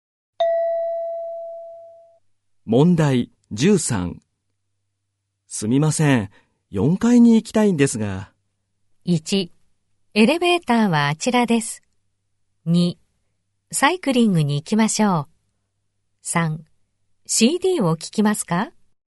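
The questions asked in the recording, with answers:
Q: すみません、4階に行きたいんですが。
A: 1: エレベーターはあちらです。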